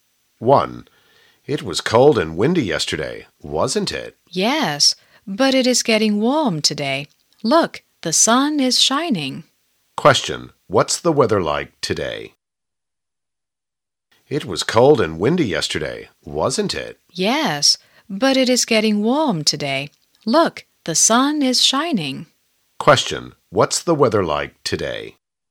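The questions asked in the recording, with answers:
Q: what's the weather like today?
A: It is getting warm and sunny.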